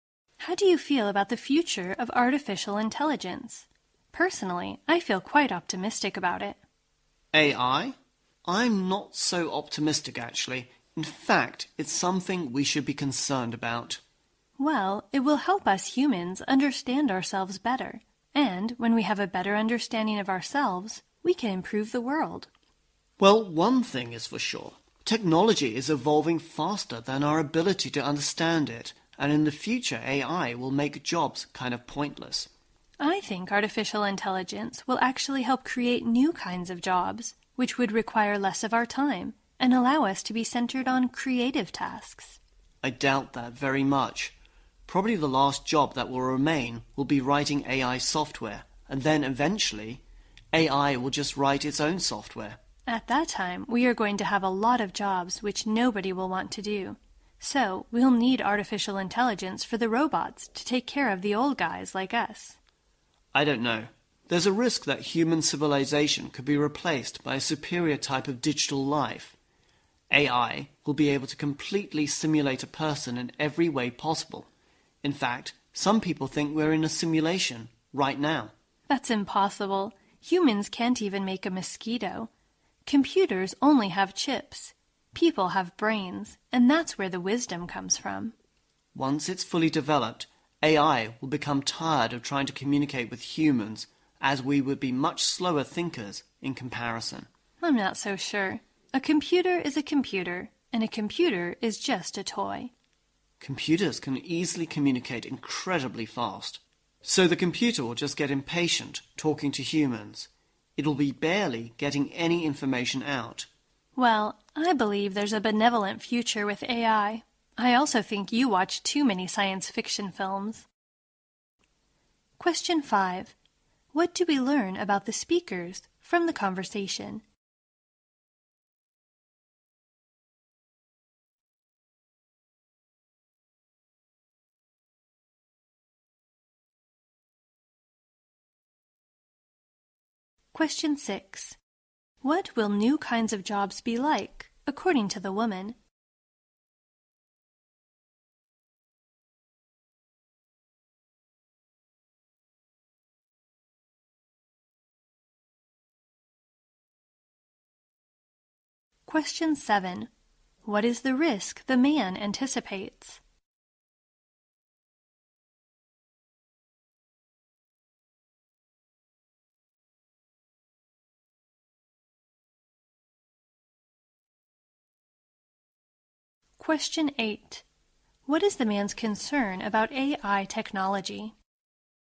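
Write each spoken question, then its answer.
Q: What will new kinds of jobs be like, according to the woman?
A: They will require less of our time and let people focus on creative tasks.

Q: What is the risk the man anticipates?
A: Human civilization could be replaced by a superior type of digital life.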